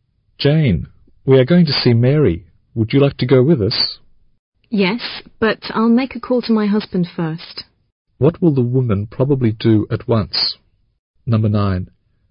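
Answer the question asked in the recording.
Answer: Call her husband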